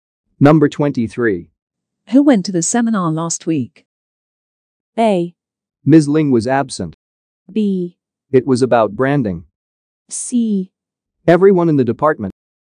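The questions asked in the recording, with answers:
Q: Who went to the seminar last week?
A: C: Everyone in the department.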